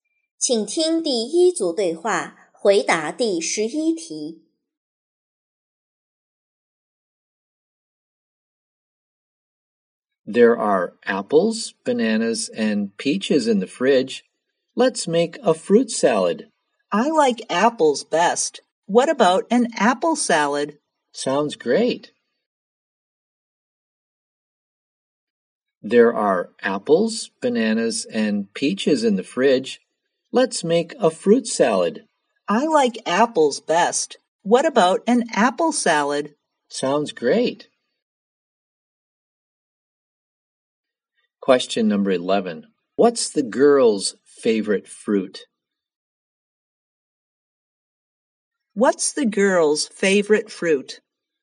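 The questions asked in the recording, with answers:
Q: What's the girl's favorite fruit?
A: Apples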